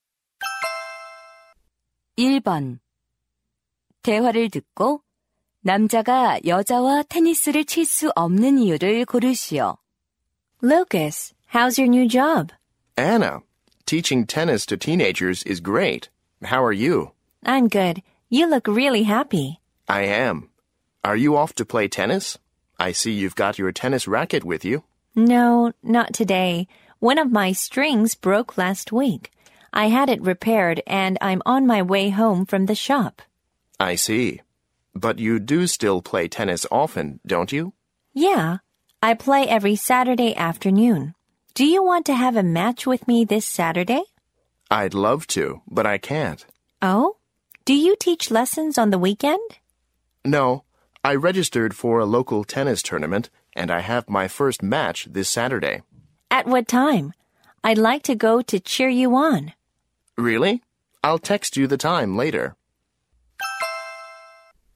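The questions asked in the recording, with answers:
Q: 대화를 듣고 남자가 여자와 테니스를 칠 수 없는 이유를 고르시오.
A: 테니스 대회 첫 경기가 있어서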